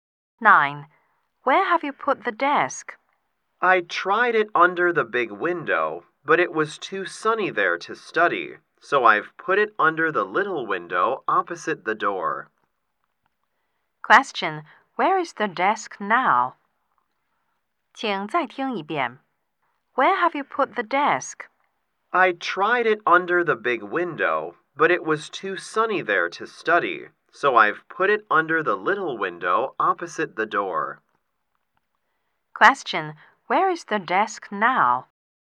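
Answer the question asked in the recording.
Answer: Under the little window opposite the door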